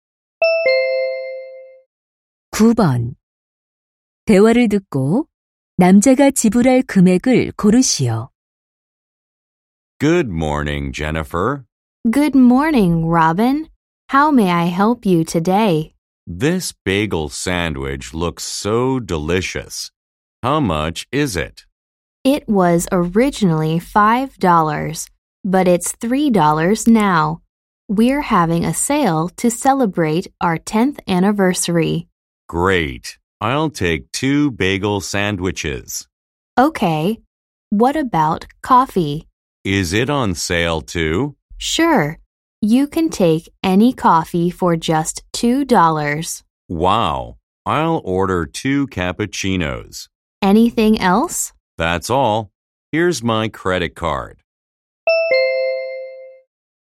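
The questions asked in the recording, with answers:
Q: 대화를 듣고 남자가 지불할 금액을 고르시오.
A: 10달러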